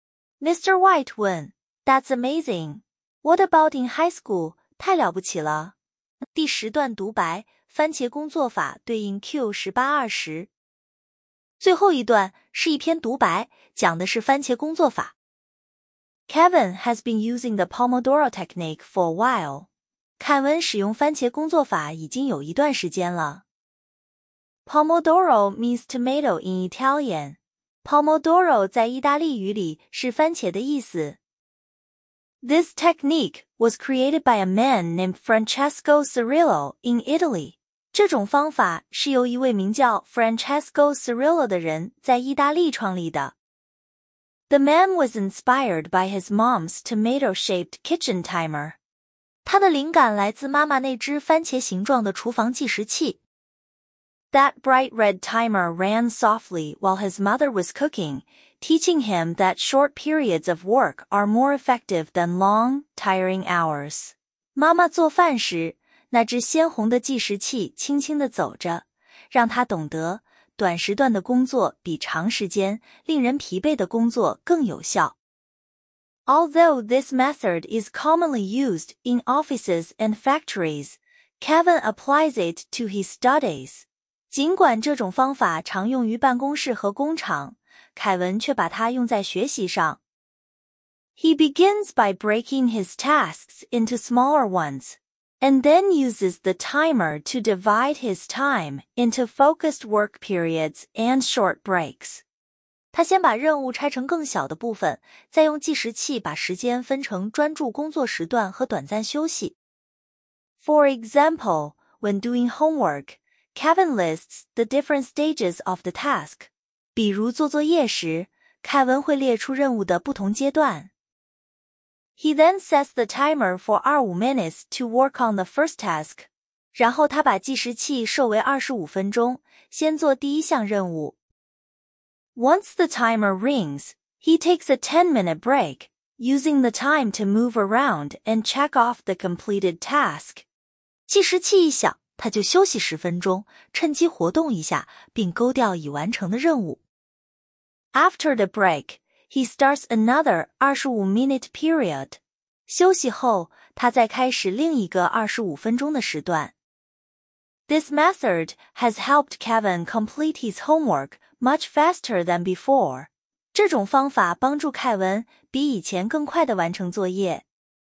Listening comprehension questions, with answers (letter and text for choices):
第二节 听 5 段对话/独白,每段读两遍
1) Who invented the Pomodoro Technique?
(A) Kevin.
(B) Kevin's mother.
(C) An Italian man.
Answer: (C) An Italian man.

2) How long does Kevin's normal work period last each time?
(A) 10 minutes.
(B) 20 minutes.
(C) 25 minutes.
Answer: (C) 25 minutes.

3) What is the Pomodoro Technique used for?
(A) Managing time well.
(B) Solving study problems.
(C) Improving cooking skills.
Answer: (A) Managing time well.

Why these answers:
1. created by Francesco Cirillo in Italy = 意大利人。Kevin 只是使用者(A);番茄计时器是 Cirillo 妈妈的,不是 Kevin 妈妈(B 张冠李戴)。
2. work period = 25 minutes;10 分钟是休息(A 干扰),20(B)纯干扰。听数字先抓限定词(work period / break)。
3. 把时间切成"专注工作 + 短休息" → 本质是时间管理(A)。用于学习 → 偷换成 B;妈妈 cooking/番茄 → 诱导 C,都是无关细节。

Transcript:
第 10 段(独白:番茄工作法) 对应 Q18–20
Kevin has been using the Pomodoro Technique for a while.
凯文使用番茄工作法已经有一段时间了。
Pomodoro means tomato in Italian.
Pomodoro 在意大利语里是"番茄"的意思。
This technique was created by a man named Francesco Cirillo in Italy.
这种方法是由一位名叫 Francesco Cirillo 的人在意大利创立的。
The man was inspired by his mom's tomato-shaped kitchen timer.
他的灵感来自妈妈那只番茄形状的厨房计时器。
That bright red timer ran softly while his mother was cooking, teaching him that short periods of work are more effective than long, tiring hours.
妈妈做饭时,那只鲜红的计时器轻轻地走着,让他懂得:短时段的工作比长时间、令人疲惫的工作更有效。
Although this method is commonly used in offices and factories, Kevin applies it to his studies.
尽管这种方法常用于办公室和工厂,凯文却把它用在学习上。
He begins by breaking his tasks into smaller ones, and then uses the timer to divide his time into focused work periods and short breaks.
他先把任务拆成更小的部分,再用计时器把时间分成专注工作时段和短暂休息。
For example, when doing homework, Kevin lists the different stages of the task.
比如做作业时,凯文会列出任务的不同阶段。
He then sets the timer for 25 minutes to work on the first task.
然后他把计时器设为 25 分钟,先做第一项任务。
Once the timer rings, he takes a 10-minute break, using the time to move around and check off the completed task.
计时器一响,他就休息 10 分钟,趁机活动一下,并勾掉已完成的任务。
After the break, he starts another 25-minute period.
休息后,他再开始另一个 25 分钟的时段。
This method has helped Kevin complete his homework much faster than before.
这种方法帮助凯文比以前更快地完成作业。

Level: 高中